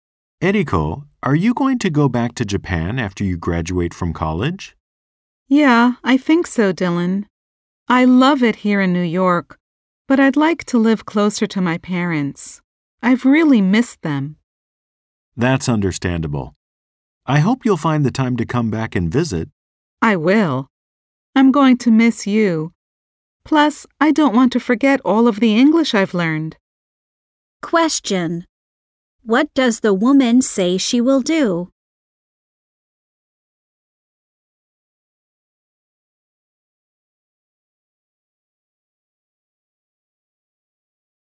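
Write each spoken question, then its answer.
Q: What does the woman say she will do?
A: Come back to New York to visit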